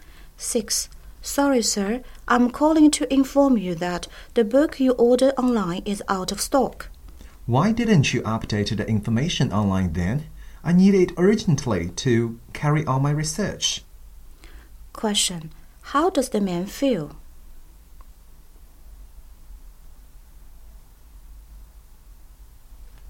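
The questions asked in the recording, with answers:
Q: How does the man feel?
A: Annoyed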